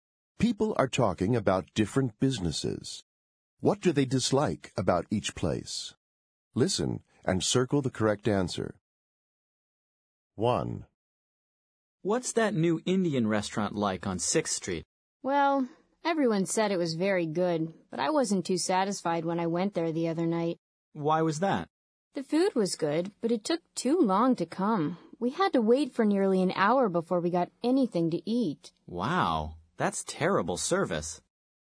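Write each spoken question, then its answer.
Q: What do they dislike about each place?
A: The food took too long to come (slow service)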